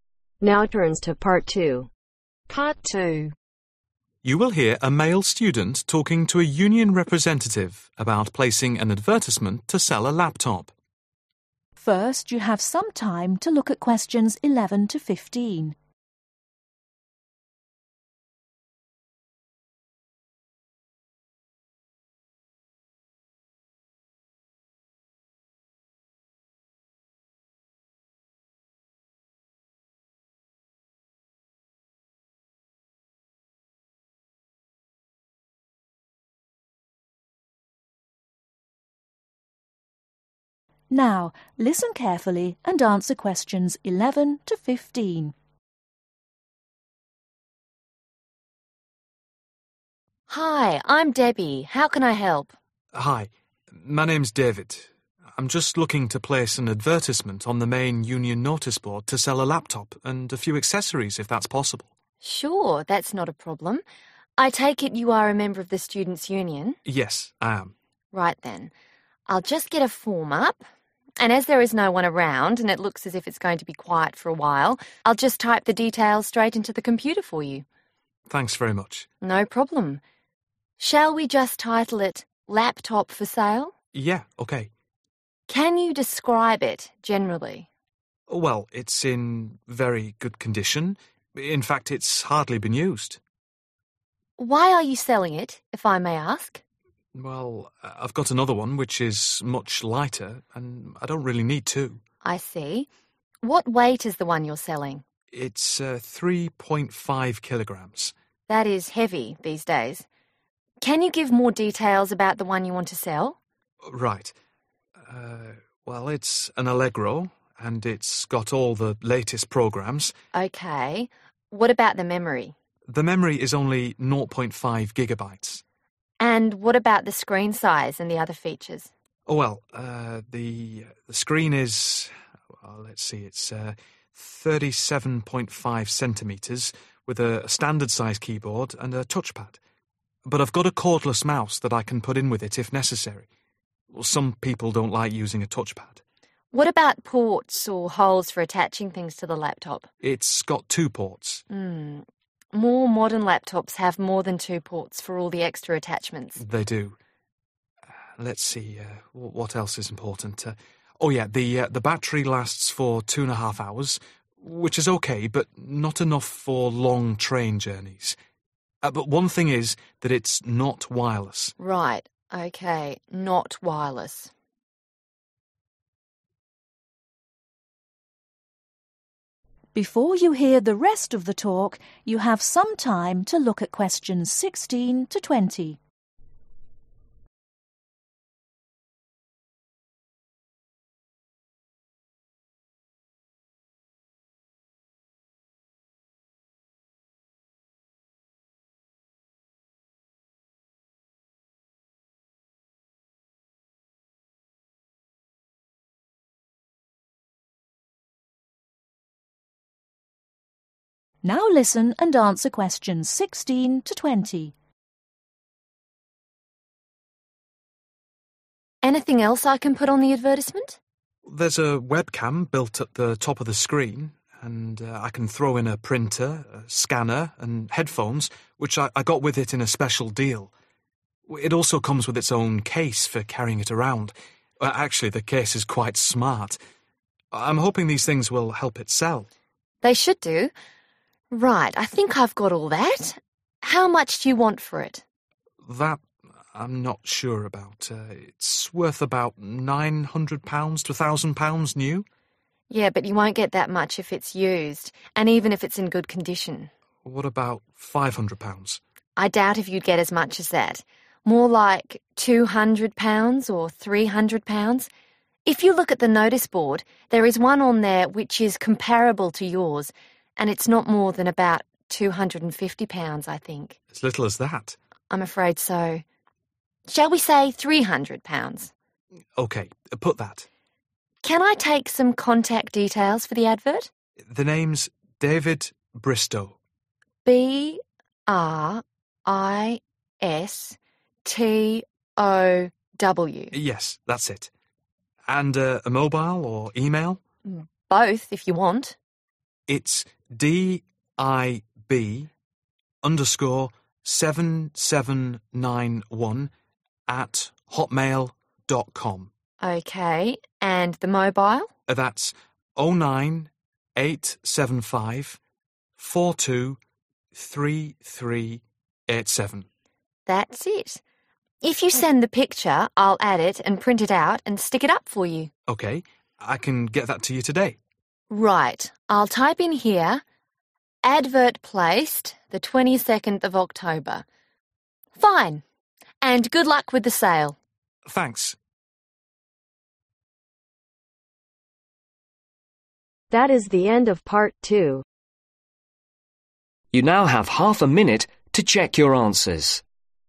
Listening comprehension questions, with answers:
Write NO MORE THAN TWO WORDS AND/OR A NUMBER for each answer.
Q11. Weight (11) ..............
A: 3.5 kg

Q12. Memory Only (12) ..............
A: 0.5 GB

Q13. Screen (13) ...............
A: 37.5 cm

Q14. Battery lasts (14) ..............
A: 21/2 or 2.5

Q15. Latest programs Not (15) ..............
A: WIRELESS

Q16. Printer with (16) ............ and headphones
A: SCANNER

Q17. Price (17) .............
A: £300

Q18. Name: David (18) ..............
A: BRISTOW

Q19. Mobile number: (19) ...............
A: 09875423387

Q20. Advert placed: (20) ...............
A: 22nd OCTOBER